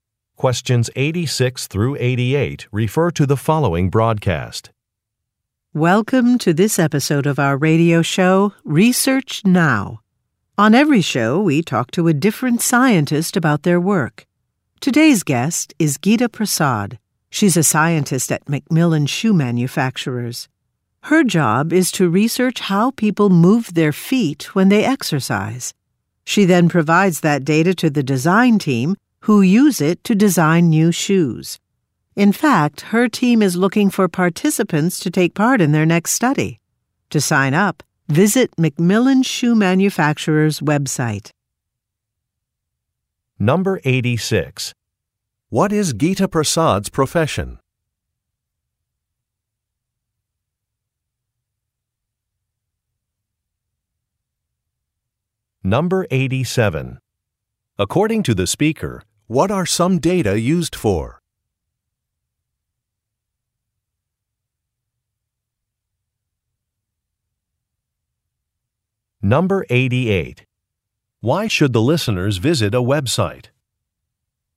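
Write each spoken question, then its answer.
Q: What is Geeta Prasad's profession?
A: Scientist

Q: According to the speaker, what are some data used for?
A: To design new shoes

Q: Why should the listeners visit a website?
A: To sign up for a study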